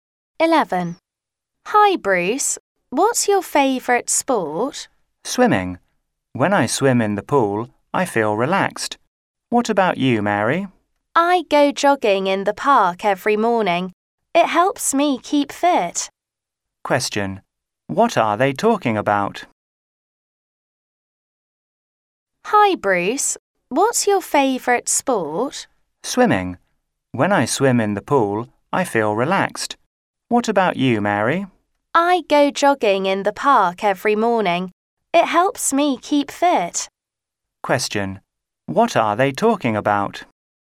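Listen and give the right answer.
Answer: Their favourite sports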